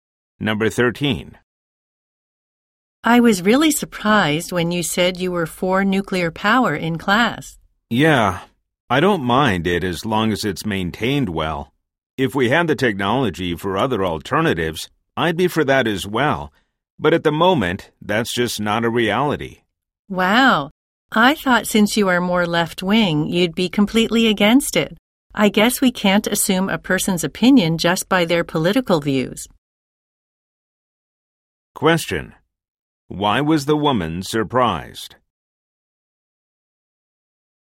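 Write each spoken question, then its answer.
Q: Why was the woman surprised?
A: The man, who is left-wing, supports nuclear power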